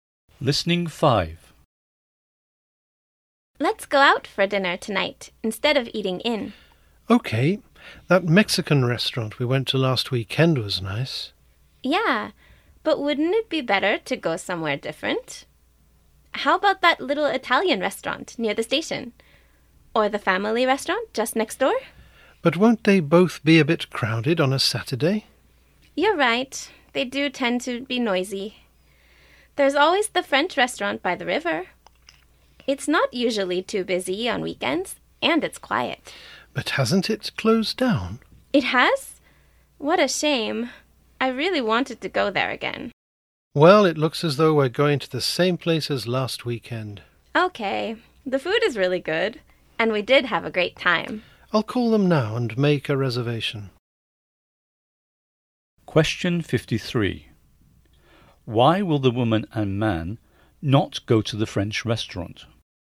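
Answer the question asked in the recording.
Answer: It has closed down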